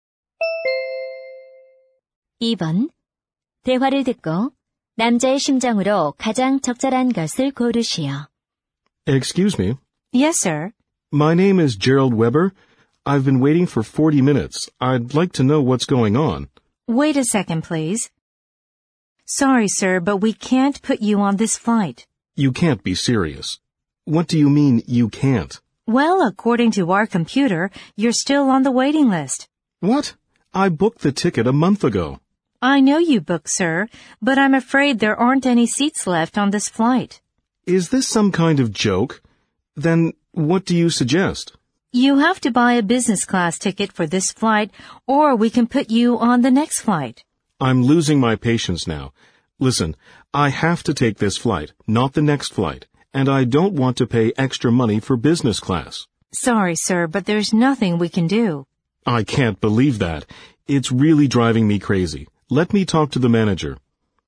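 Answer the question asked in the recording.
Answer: 화가 남 (짜증 남)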